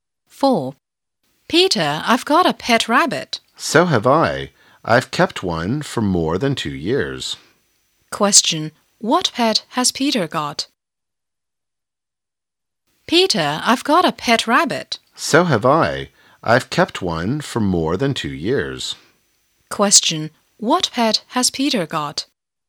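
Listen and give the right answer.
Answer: A rabbit.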